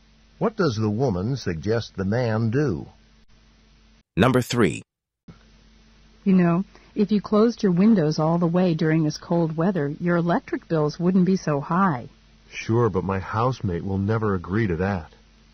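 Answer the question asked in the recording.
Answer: His housemate won't agree to keep the windows closed.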